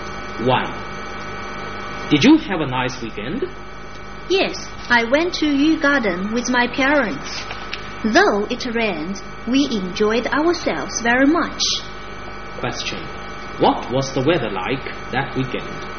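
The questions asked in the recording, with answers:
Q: What was the weather like that weekend?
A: It rained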